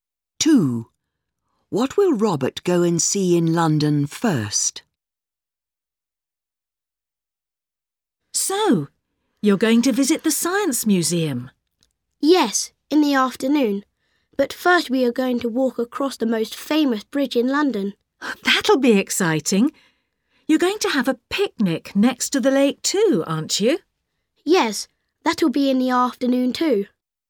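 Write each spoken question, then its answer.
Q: What will Robert go and see in London first?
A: The most famous bridge in London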